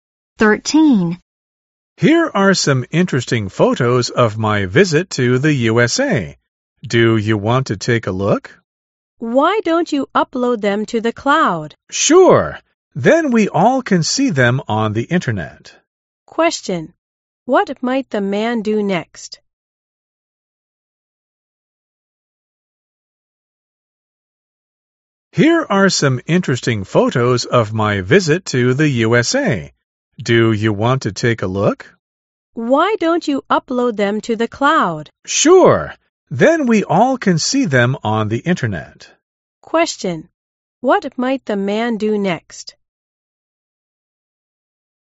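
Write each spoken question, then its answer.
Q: What might the man do next?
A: Upload the photos to the cloud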